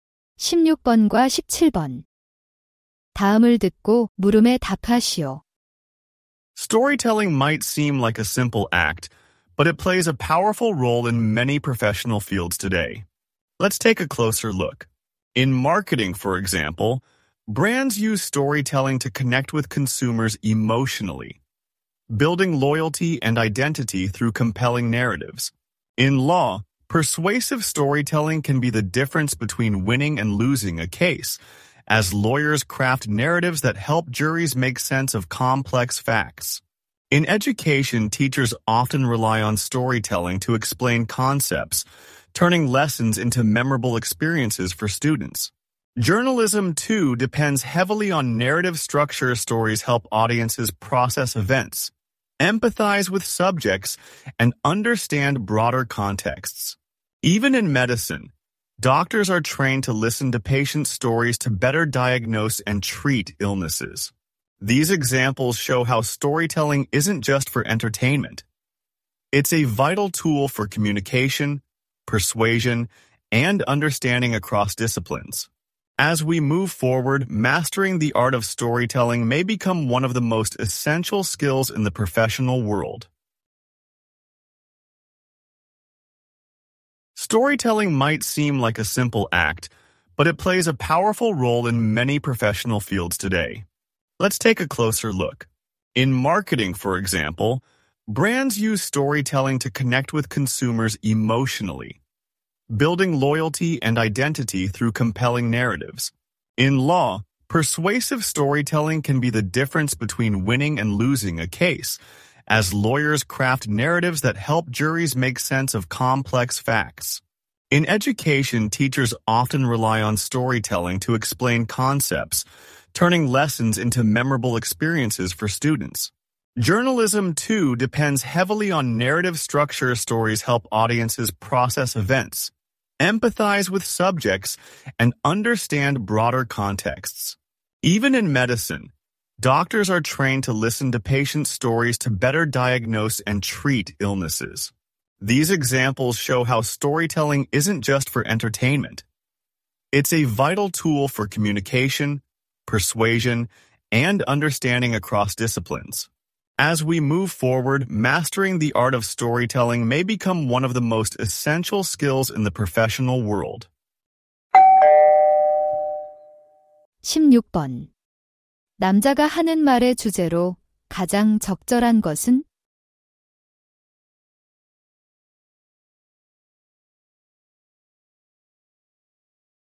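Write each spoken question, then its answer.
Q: 남자가 하는 말의 주제로 가장 적절한 것은?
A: 여러 전문 분야에서 스토리텔링이 하는 역할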